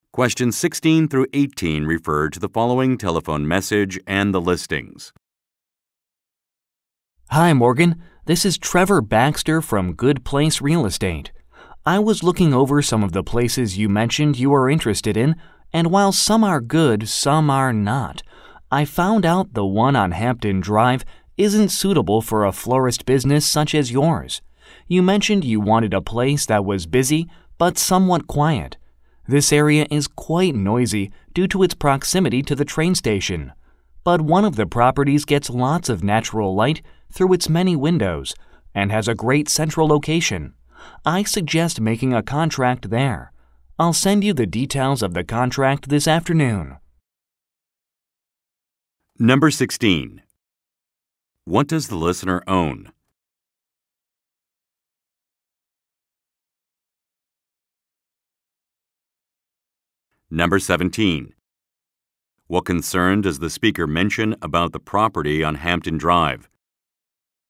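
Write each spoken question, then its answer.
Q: What does the listener own?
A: A florist business

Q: What concern does the speaker mention about the property on Hampton Drive?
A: It is noisy because it is close to the train station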